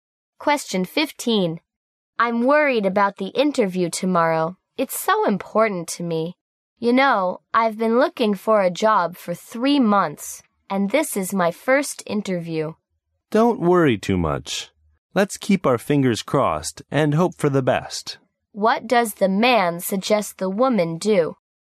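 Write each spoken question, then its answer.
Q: What does the man suggest the woman do?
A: Not worry too much and hope for the best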